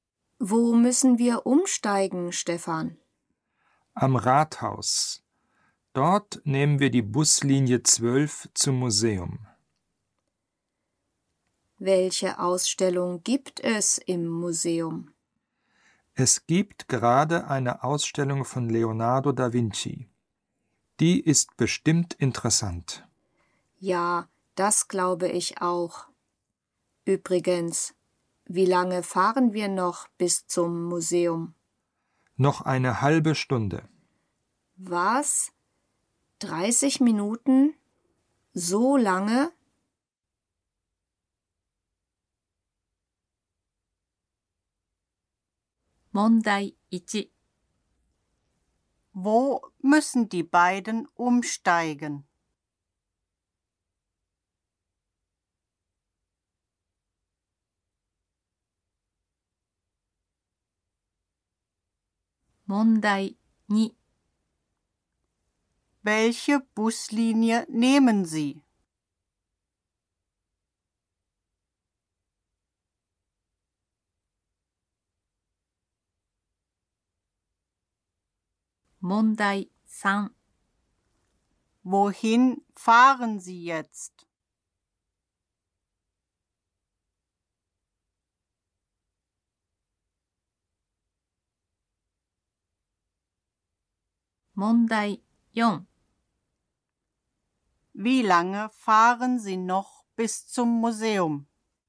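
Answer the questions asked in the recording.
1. Am Rathaus
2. 12
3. Zum Museum
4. 30 Minuten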